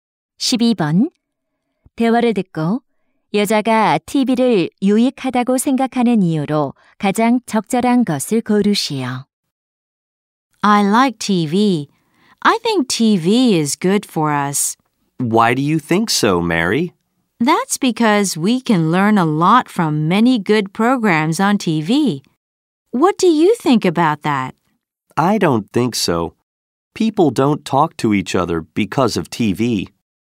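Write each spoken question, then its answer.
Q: 대화를 듣고 여자가 TV를 유익하다고 생각하는 이유로 가장 적절한 것을 고르시오.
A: 좋은 프로그램으로 많은 것을 배울 수 있어서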